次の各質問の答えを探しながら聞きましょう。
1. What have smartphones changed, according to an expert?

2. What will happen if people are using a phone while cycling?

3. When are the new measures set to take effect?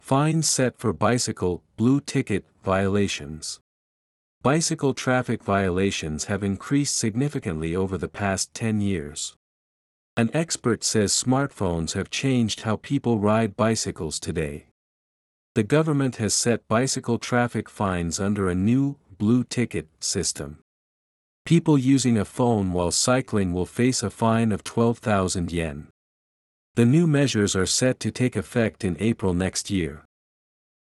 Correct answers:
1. The expert says smartphones have changed how people ride bicycles today.
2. They will face a fine of 12,000 yen.
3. They are set to take effect in April next year.

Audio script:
Fines Set for Bicycle "Blue Ticket" Violations
Bicycle traffic violations have increased significantly over the past ten years.
An expert says smartphones have changed how people ride bicycles today.
The government has set bicycle traffic fines under a new "blue ticket" system.
People using a phone while cycling will face a fine of 12,000 yen.
The new measures are set to take effect in April next year.

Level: 中級脱出